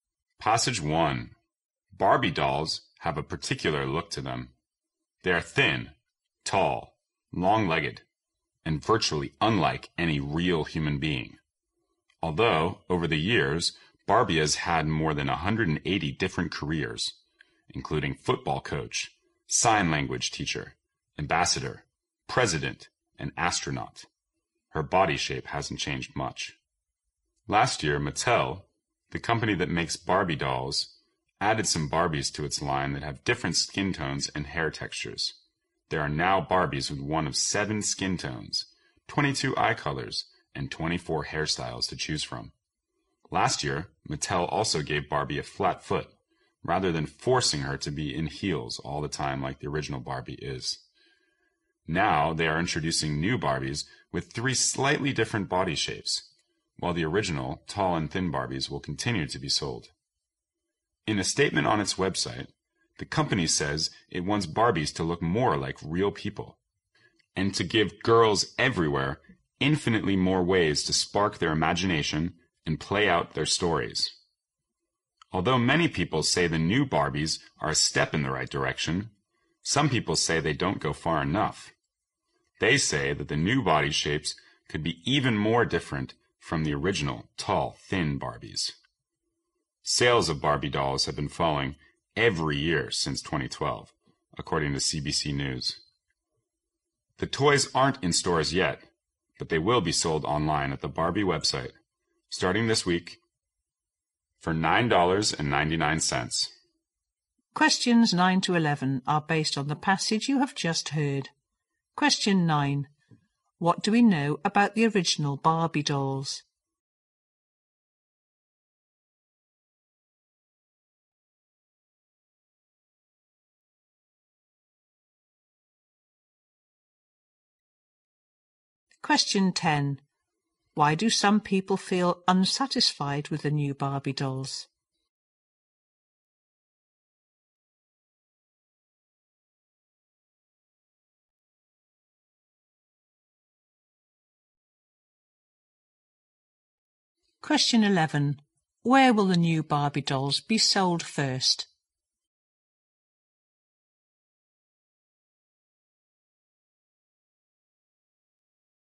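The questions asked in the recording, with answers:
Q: What do we know about the original Barbie dolls?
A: They are thin, tall and long-legged, unlike real people

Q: Why do some people feel unsatisfied with the new Barbie dolls?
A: The new body shapes are not different enough from the original

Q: Where will the new Barbie dolls be sold first?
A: Online on the Barbie website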